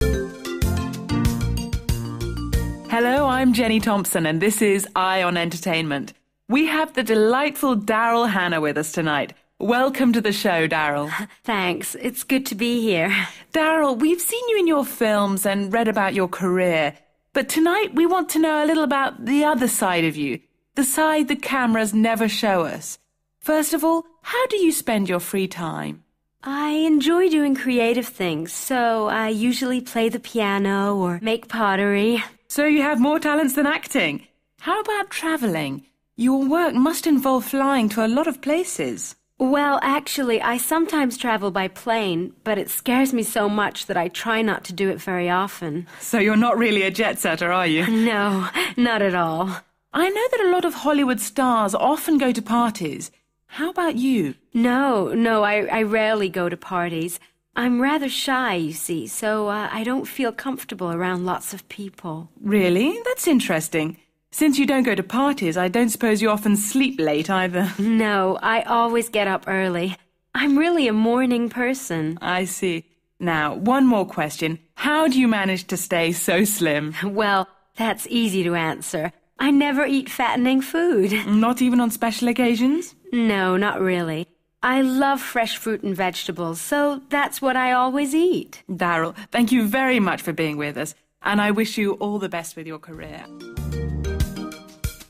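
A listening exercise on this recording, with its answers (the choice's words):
2. Read the table, then listen and tick (✓) the correct boxes.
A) always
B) usually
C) sometimes / occasionally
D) rarely / hardly ever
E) never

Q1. travel by plane?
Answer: sometimes / occasionally

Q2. go to parties?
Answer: rarely / hardly ever

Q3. get up early?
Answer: always

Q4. eat fattening food?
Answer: never

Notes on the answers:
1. Well, actually, I sometimes travel by plane, but it scares me so much that I try no to do it very often.
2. No, no, I rarely go to parties. I'm rather shy, you see, so I don't feel comfortable around lots of people.
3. No, I always get up early. I'm really a morning person.
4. Well, that's easy to answer – I never eat fattening food.

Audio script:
Presenter: Hello, I'm Jenny Thompson and this is "Eye on Entertainment". We have the delightful Daryl Hannah with us tonight. 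Welcome to the show, Daryl.
Daryl: Thanks. It's good to be here.
Presenter: Daryl, we've seen you in your films and read about your career, but tonight we want to know a little about the other side of you – the side the cameras never show us. First of all, how do you spend your free time?
Daryl: I enjoy doing creative things, so I usually play the piano or make pottery.
Presenter: So you have more talents than acting. How about travelling? Your work must involve flying to a lot of places.
Daryl: Well, actually, I sometimes travel by plane, but it scares me so much that I try no to do it very often.
Presenter: So you're not really a jet-seller, are you?
Daryl: No, not at all.
Presenter: I know that a lot of Hollywood stars often go to parties. How about you?
Daryl: No, no, I rarely go to parties. I'm rather shy, you see, so I don't feel comfortable around lots of people.
Presenter: Really? 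That's interesting. Since you don't go to parties, I don't suppose you often sleep late either?
Daryl: No, I always get up early. I'm really a morning person.
Presenter: I see. Now, one more question – how do you manage to stay so slim?
Daryl: Well, that's easy to answer – I never eat fattening food.
Presenter: Not even on special occasions?
Daryl: No, not really. I love fresh fruit and vegetables, so that's what I always eat.
Presenter: Daryl, thank you very much for being with us, and I wish you all the best with your career ...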